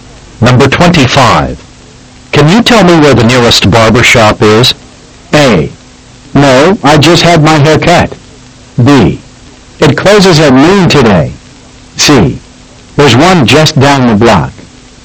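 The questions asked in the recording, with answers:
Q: Can you tell me where the nearest barber shop is?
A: C: There's one just down the block.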